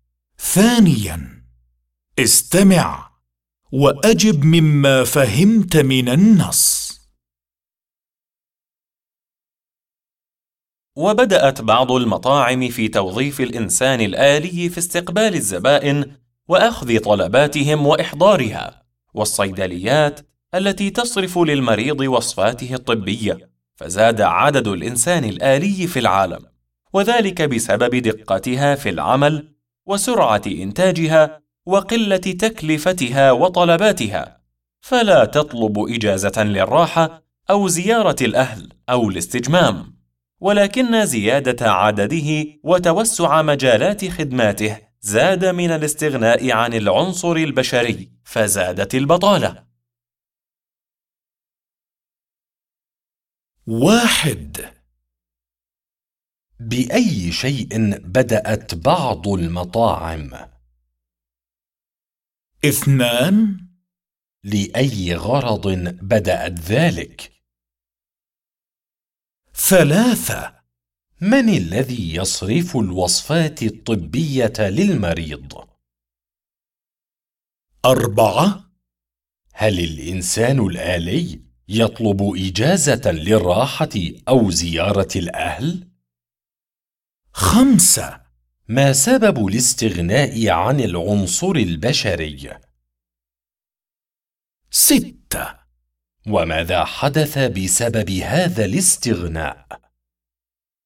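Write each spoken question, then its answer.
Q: بأي شيء بدأت بعض المطاعم؟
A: بتوظيف الإنسان الآلي

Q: لأي غرض بدأت ذلك؟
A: استقبال الزبائن وأخذ طلباتهم وإحضارها

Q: من الذي يصرف الوصفات الطبية للمريض؟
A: الإنسان الآلي في الصيدليات

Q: هل الإنسان الآلي يطلب إجازة للراحة أو زيارة الأهل؟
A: لا، لا يطلب إجازة

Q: ما سبب الاستغناء عن العنصر البشري؟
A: زيادة عدد الإنسان الآلي وتوسع مجالات خدماته

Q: وماذا حدث بسبب هذا الاستغناء؟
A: زادت البطالة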